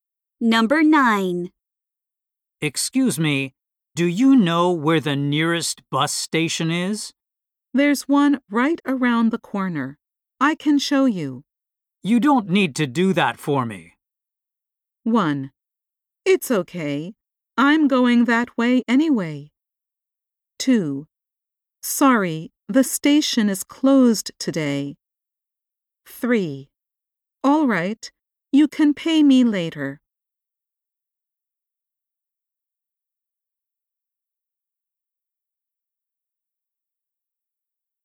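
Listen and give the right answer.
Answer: 1: It's okay. I'm going that way anyway.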